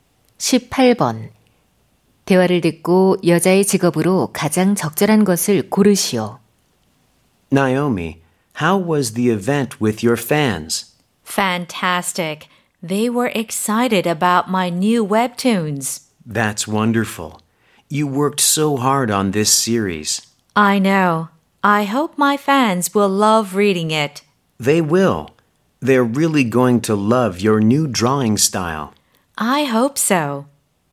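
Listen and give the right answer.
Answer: 웹툰 작가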